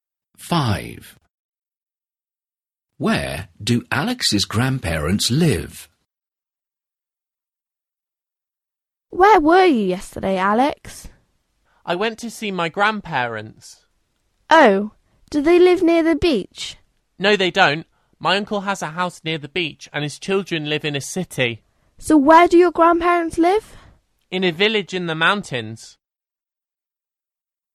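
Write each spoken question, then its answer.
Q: Where do Alex's grandparents live?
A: in a village in the mountains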